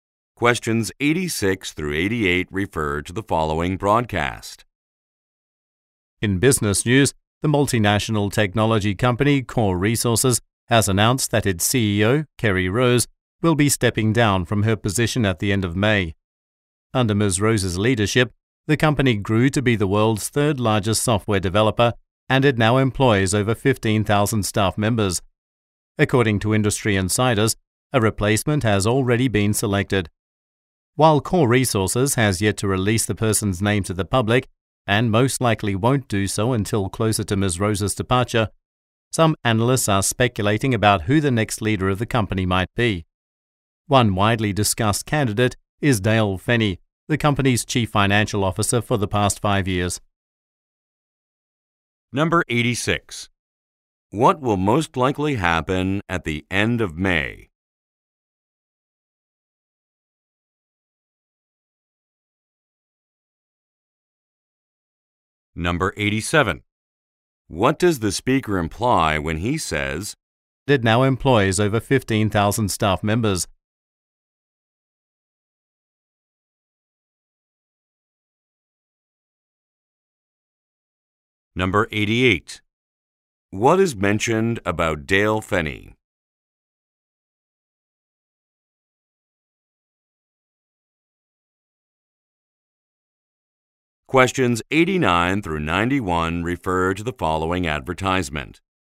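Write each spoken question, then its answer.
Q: What will most likely happen at the end of May?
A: The CEO will step down

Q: What does the speaker imply when he says, "It now employs over 15,000 staff members"?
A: The company grew a lot under Ms. Rose

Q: What is mentioned about Dale Fenney?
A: He has been the chief financial officer for 5 years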